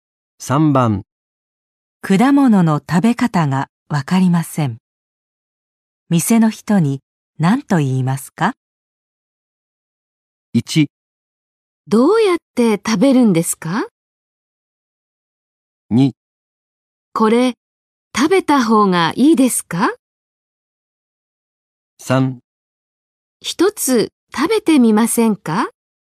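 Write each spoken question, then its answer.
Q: 果物の食べ方がわかりません。店の人に何と言いますか?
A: 1: どうやって食べるんですか?

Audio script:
1
どうやって食べるんですか。
2
これ、食べた方がいいですか。
3
一つ食べてみませんか。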